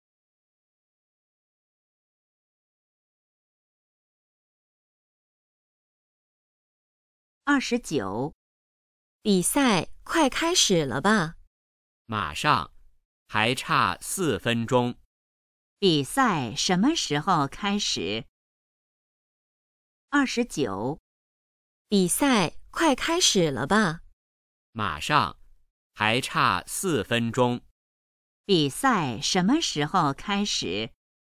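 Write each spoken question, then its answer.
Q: 比赛什么时候开始?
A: 4分钟后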